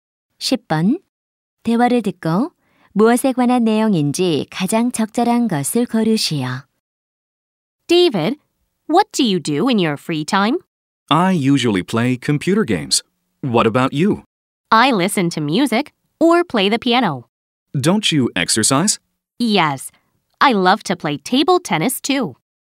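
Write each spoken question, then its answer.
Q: 대화를 듣고 무엇에 관한 내용인지 가장 적절한 것을 고르시오.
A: 여가 활동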